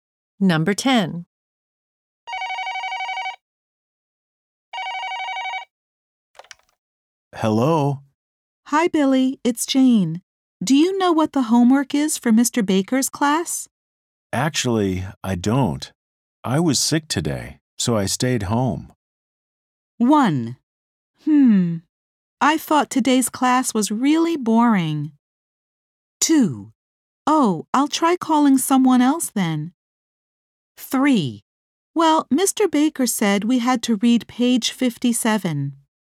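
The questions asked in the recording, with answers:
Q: Actually, I don't. I was sick today, so I stayed home.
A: 2: Oh, I'll try calling someone else then.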